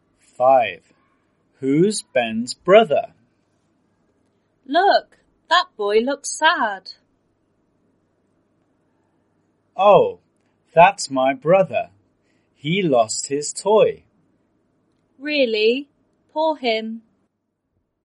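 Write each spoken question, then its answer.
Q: Who's Ben's brother?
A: The sad boy who lost his toy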